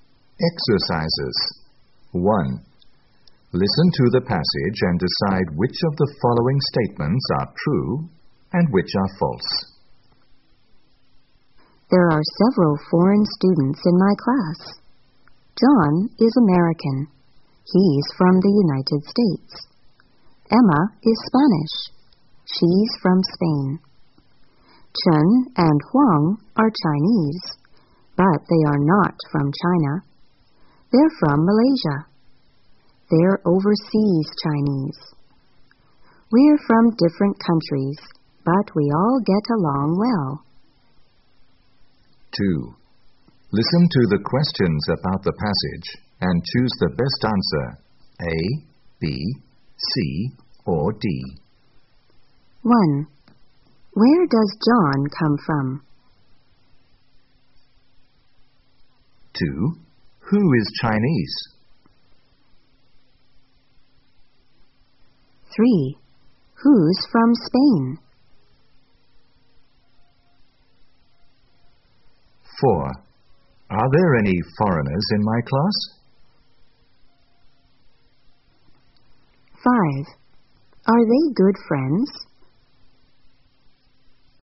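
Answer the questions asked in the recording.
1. The United States
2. Chen and Huang
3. Emma
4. Yes, there are several
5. Yes, they all get along well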